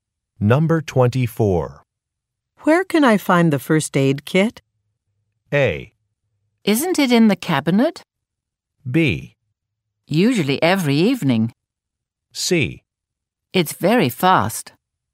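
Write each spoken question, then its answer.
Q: Where can I find the first aid kit?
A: A: Isn't it in the cabinet?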